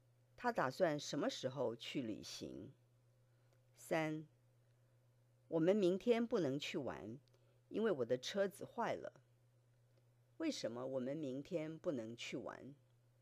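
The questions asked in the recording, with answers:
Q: 为什么我们明天不能去玩?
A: 因为我的车子坏了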